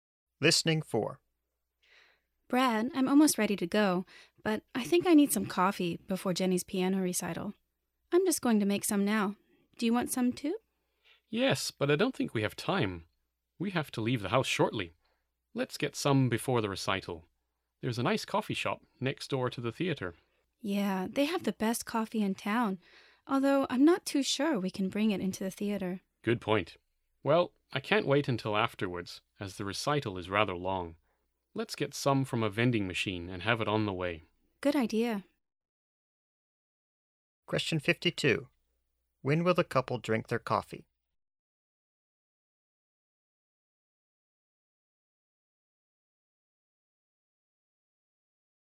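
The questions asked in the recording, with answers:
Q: When will the couple drink their coffee?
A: On the way to the recital (from a vending machine)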